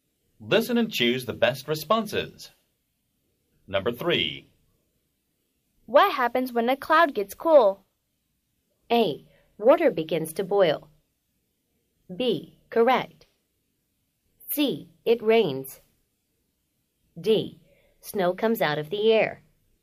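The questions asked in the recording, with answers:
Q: What happens when a cloud gets cool?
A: C: It rains.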